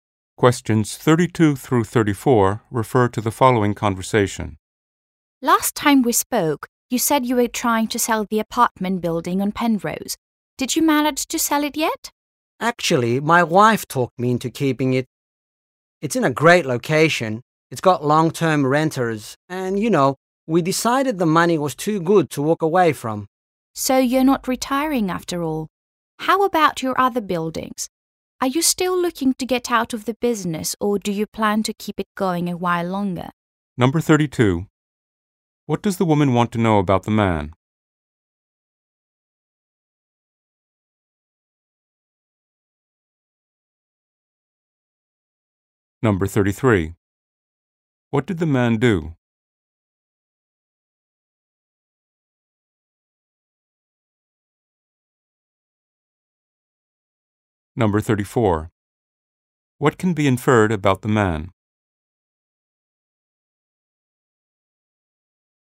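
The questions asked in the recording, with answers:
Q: What does the woman want to know about the man?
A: Whether he has sold his apartment building on Penrose

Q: What did the man do?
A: He decided to keep the building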